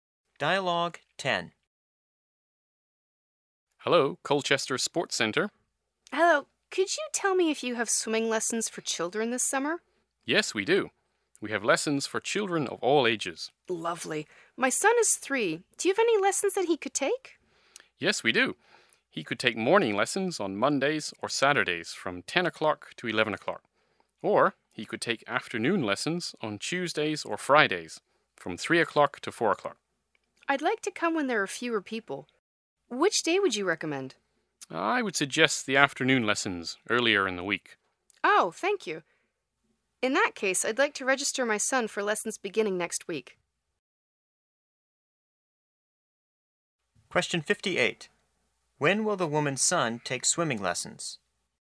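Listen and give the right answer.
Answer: Tuesday afternoons, from 3 to 4 o'clock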